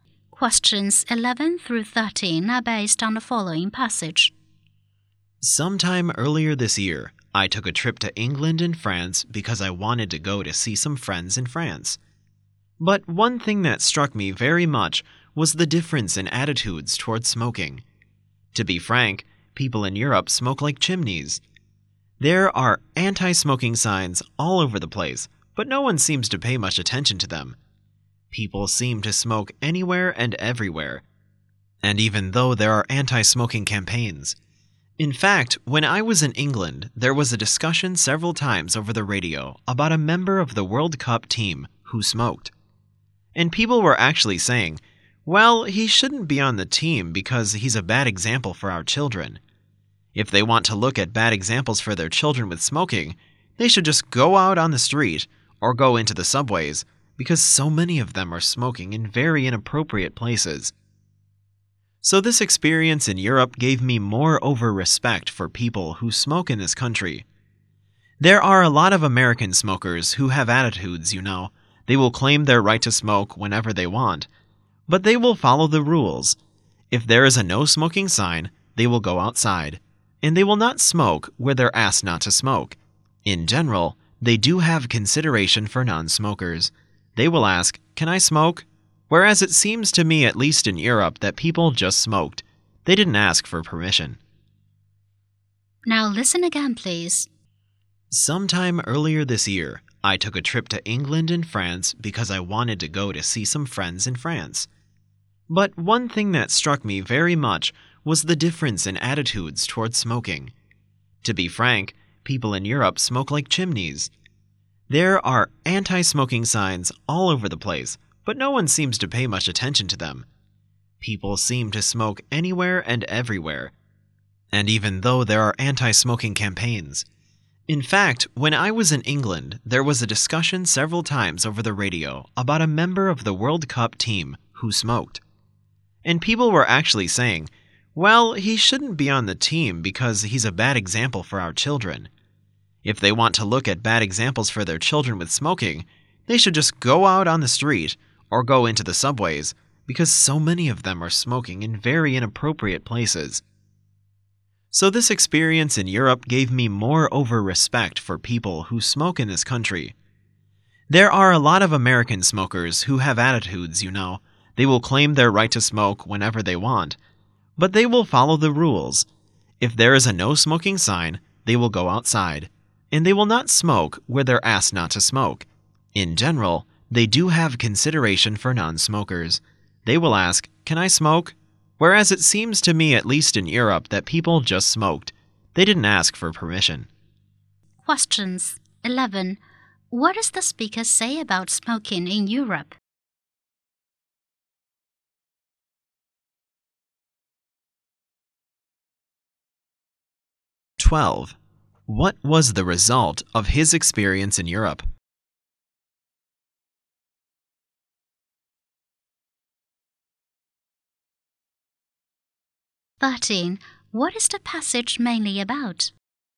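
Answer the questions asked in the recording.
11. People smoke everywhere and ignore anti-smoking signs
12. He gained more respect for smokers in America
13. Different attitudes toward smoking in Europe and America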